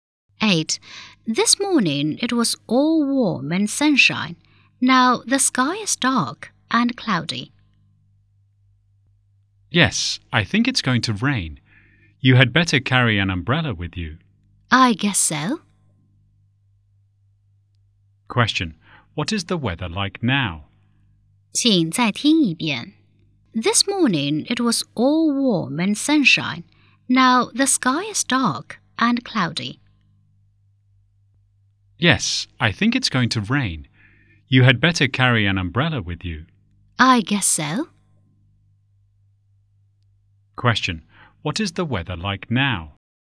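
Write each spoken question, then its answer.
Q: What is the weather like now?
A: Dark and cloudy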